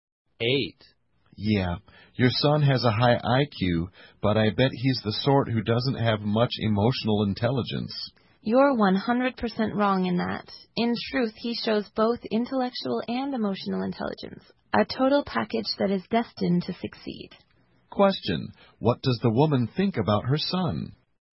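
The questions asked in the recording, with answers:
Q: What does the woman think about her son?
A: He has both high intellectual and emotional intelligence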